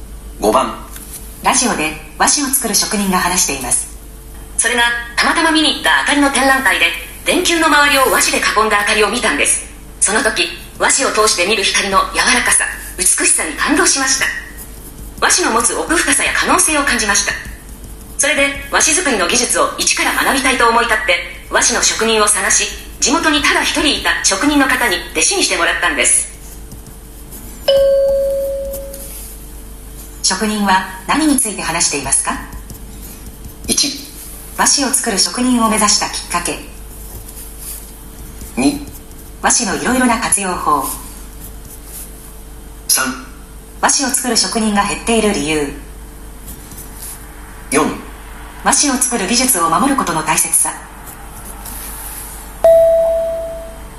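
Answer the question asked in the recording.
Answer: 1: 和紙を作る職人を目指したきっかけ。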